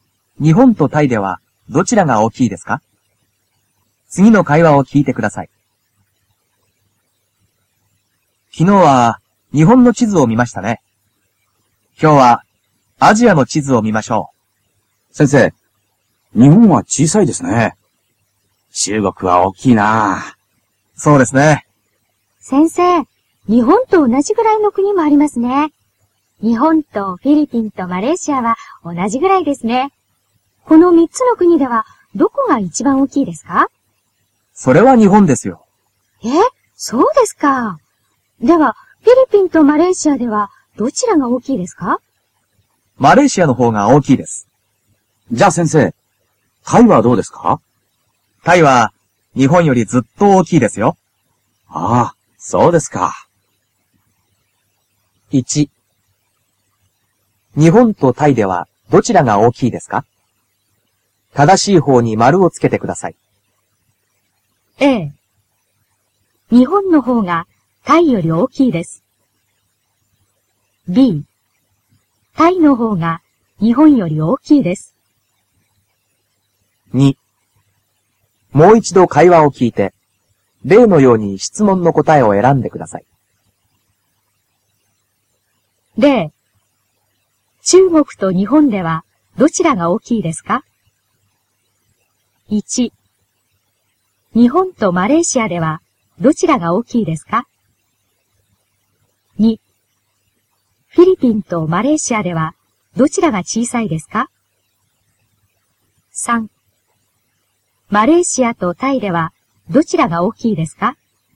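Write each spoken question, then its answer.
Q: 日本とタイではどちらが大きいですか?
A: B: タイの方が日本より大きいです。

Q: 日本とマレーシアではどちらが大きいですか?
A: 日本

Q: フィリピンとマレーシアではどちらが小さいですか?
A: フィリピン

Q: マレーシアとタイではどちらが大きいですか?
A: タイ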